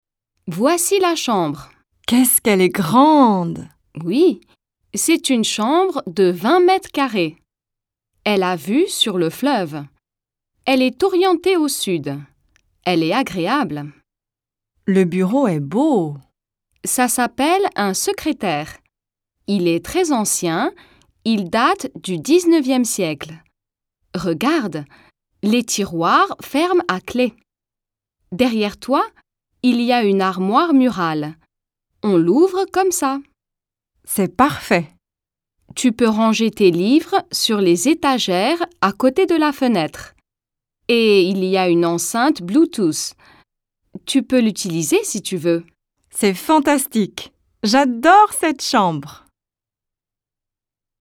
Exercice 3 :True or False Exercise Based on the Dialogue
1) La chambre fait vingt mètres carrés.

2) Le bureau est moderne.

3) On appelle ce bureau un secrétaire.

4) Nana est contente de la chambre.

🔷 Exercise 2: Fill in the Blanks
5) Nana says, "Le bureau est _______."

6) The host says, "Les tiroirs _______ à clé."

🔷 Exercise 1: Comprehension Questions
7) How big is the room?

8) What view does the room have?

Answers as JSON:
{"1": "vrai", "2": "faux", "3": "vrai", "4": "vrai", "5": "beau", "6": "ferment", "7": "The room is twenty square meters.", "8": "The room has a view of the river."}

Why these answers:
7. This is mentioned when the host describes the room's size.
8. This is noted when the host explains the room's orientation and scenic view.

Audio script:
Julie: Voici la chambre.
Nana: Qu'est-ce qu'elle est grande!
Julie: Oui, c'est une chambre de 20 mètres carrés. Elle a vue sur le fleuve. Elle est orientée au sud. Elle est agréable.
Nana: Le bureau est beau.
Julie: Ça s'appelle un secrétaire. Il est très ancien, il date du 19e siècle. Regarde, les tiroirs ferment à clé. Derrière toi, il y a une armoire murale. On l'ouvre comme ça.
Nana: C'est parfait.
Julie: Tu peux ranger tes livres sur les étagères à côté de la fenêtre. Et il y a une enceinte Bluetooth. Tu peux l'utiliser, si tu veux.
Nana: C'est fantastique! J'adore cette chambre.

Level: intermediate